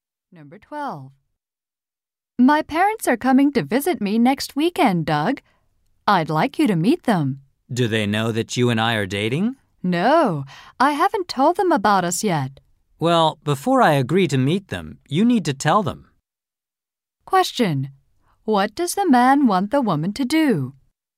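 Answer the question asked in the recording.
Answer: Tell her parents that they are dating.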